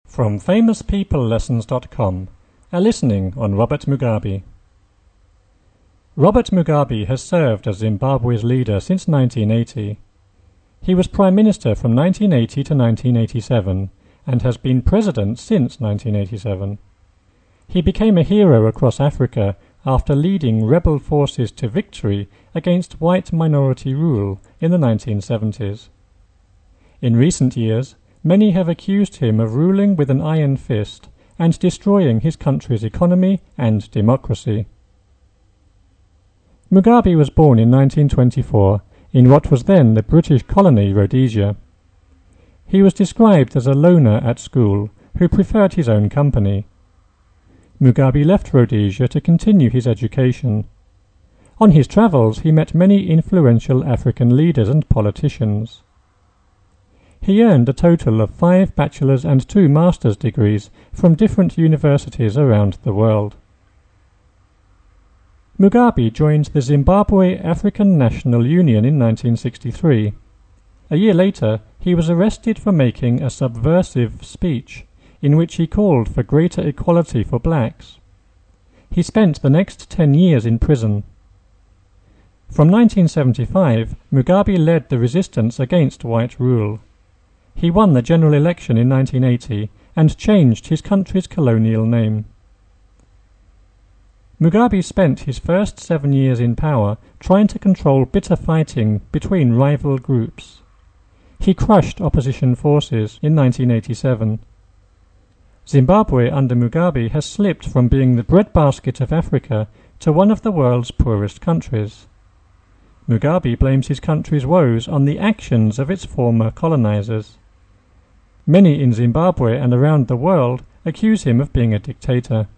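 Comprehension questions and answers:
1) Robert Mugabe _______________ Zimbabwe's leader since 1980.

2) He was Prime Minister from 1980 to 1987 _______________ President since 1987.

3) He became a hero across Africa after leading rebel forces _______________ white minority rule in the 1970s.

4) In recent years, many have accused him of ruling with _______________ destroying his country's economy and democracy.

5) Mugabe was born in 1924 in _______________ the British colony Rhodesia.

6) He was described as a loner at school who preferred _______________.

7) _______________, he met many influential African leaders and politicians.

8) He earned _______________ Bachelor's and two Master's degrees from different universities around the world.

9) A year later _______________ for making a "subversive speech" in which he called _______________ for blacks.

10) From 1975, Mugabe led the resistance _______________.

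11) He won the general election in 1980 and changed his country's _______________.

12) Mugabe spent his first seven years _______________ to control bitter fighting between rival groups.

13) Zimbabwe under Mugabe _______________ being the breadbasket of Africa to one of the world's poorest countries.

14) Mugabe blames his country's _______________ actions of its former colonizers.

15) Many in Zimbabwe and around the world _______________ being a dictator.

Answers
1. has served as
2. and has been
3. to victory against
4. an iron fist and
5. what was then
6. his own company
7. On his travels
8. a total of five
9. he was arrested; for greater equality
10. against white rule
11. colonial name
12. in power trying
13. has slipped from
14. woes on the
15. accuse him of

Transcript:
Robert Mugabe has served as Zimbabwe's leader since 1980. He was Prime Minister from 1980 to 1987 and has been President since 1987. 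He became a hero across Africa after leading rebel forces to victory against white minority rule in the 1970s.
He became a hero across Africa after leading rebellion / rebel forces to victory against white minority rule in the 1970s. In recent years, many have accused him of ruling with an iron fist / palm and destroying his country's economy and democracy.
Mugabe was born in 1924 in what was then the British colony Rhodesia. He was described as a loner / lonely at school who preferred his own firm / company. Mugabe left Rhodesia to continue his education. On his travels / travelling, he met many influential African leaders and politicians. He earned a total with / of five Bachelor's and two Master's degrees from different universities around the world.
Mugabe joined the Zimbabwe African National Union in 1963. A year later he was / has arrested for making a "subversive speech / speeches" in which he called for greater equality for / with blacks. 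He spent the next ten years in prison. From 1975, Mugabe led the resistance against white rule / ruler. He won the general election in 1980 and changed his country's colonial name.
Mugabe spent his first seven years in / on power trying to control bitter / bitterness fighting between rival groups.
Mugabe spent his first seven years in power trying to control bitter fighting between rival
groups. He crushed opposition forces in 1987. Zimbabwe under Mugabe has slipped from being the breadbasket
of Africa to one of the world's poorest countries. Mugabe blames his country's woes on the actions of its former
Many in Zimbabwe and around the world accuse him of being a dictator.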